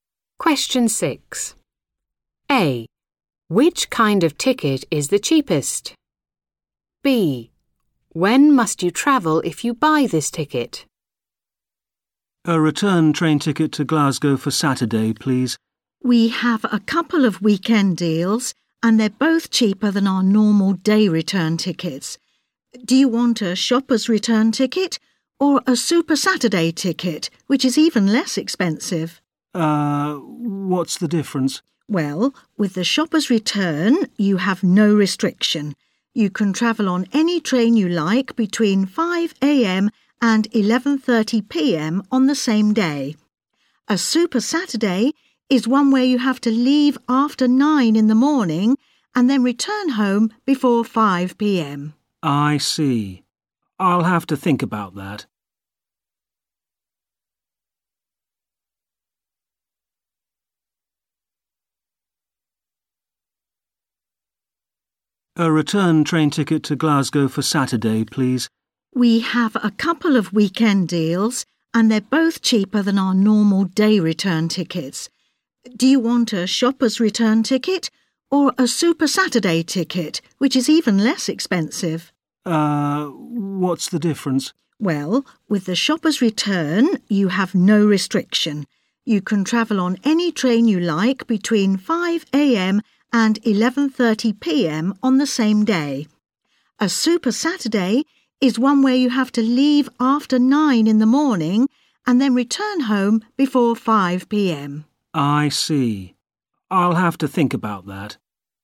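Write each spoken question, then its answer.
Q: Which kind of ticket is the cheapest?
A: Super Saturday ticket

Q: When must you travel if you buy this ticket?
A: Leave after 9 a.m. and return before 5 p.m.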